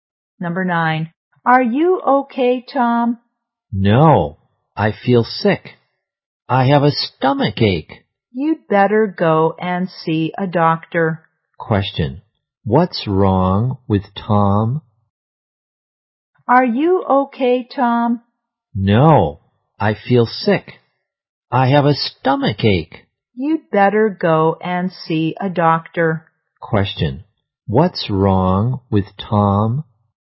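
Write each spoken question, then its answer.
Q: Question. What's wrong with Tom?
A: He has a stomach ache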